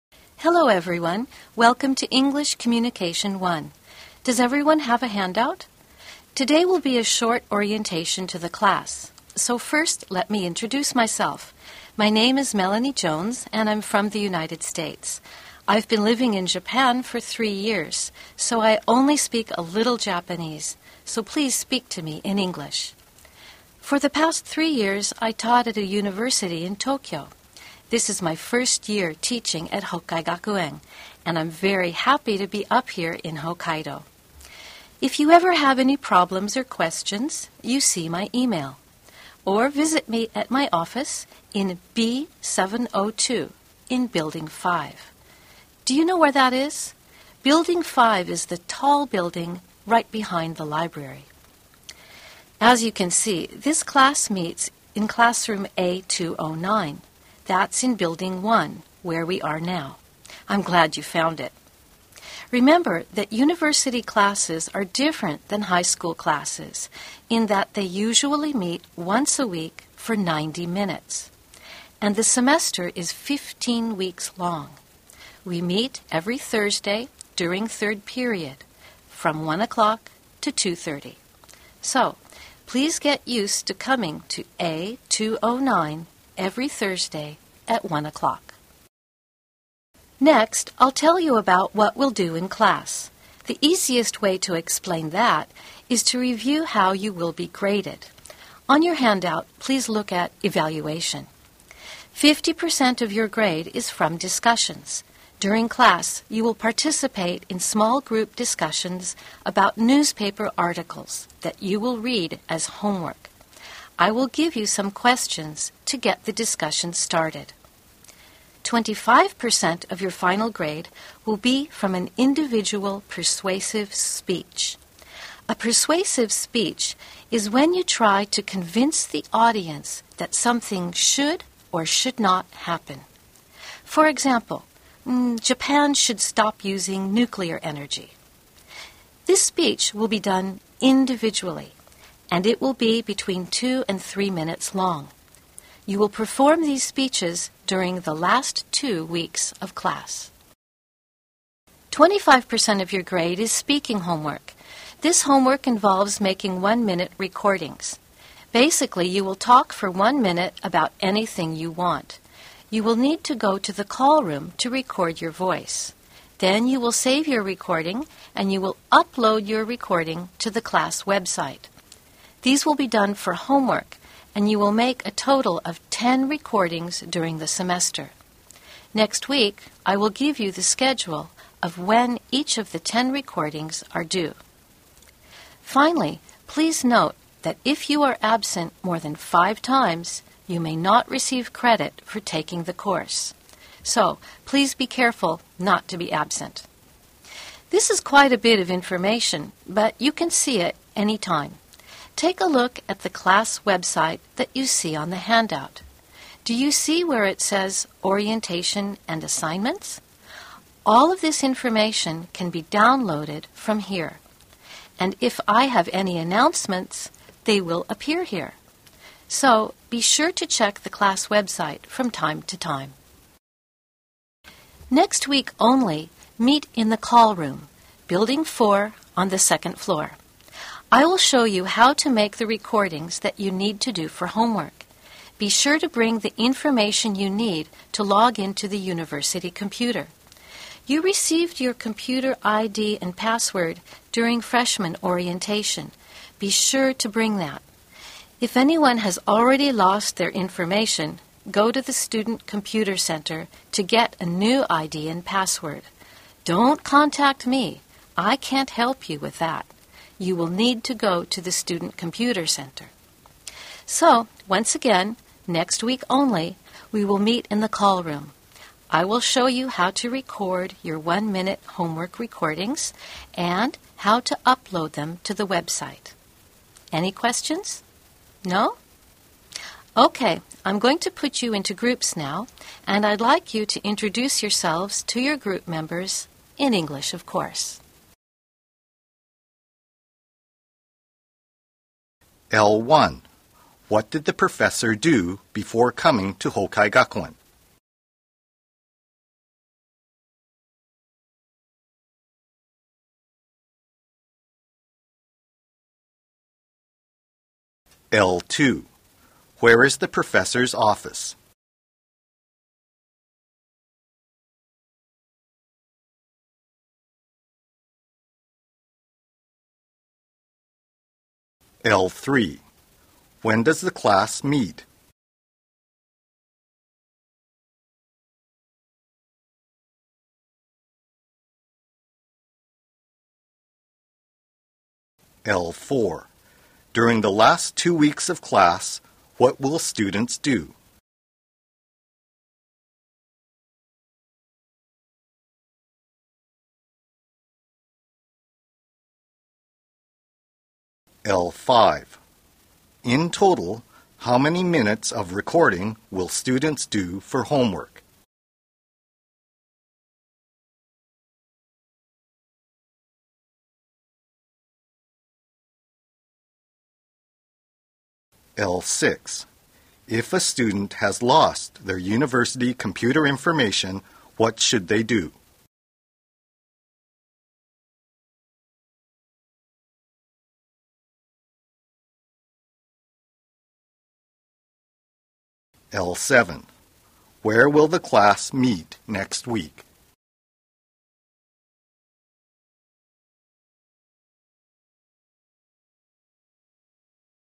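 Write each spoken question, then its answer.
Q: What did the professor do before coming to Hokkai Gakuen?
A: She taught at a university in Tokyo for 3 years

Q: Where is the professor's office?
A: Room B702 in Building 5, behind the library

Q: When does the class meet?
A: Every Thursday, third period, 1:00 to 2:30

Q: During the last 2 weeks of class, what will students do?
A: Give individual persuasive speeches

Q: In total, how many minutes of recording will students do for homework?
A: 10 minutes

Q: If a student has lost their university computer information, what should they do?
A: Go to the Student Computer Center to get a new ID and password

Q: Where will the class meet next week?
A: In the call room, on the second floor of Building 4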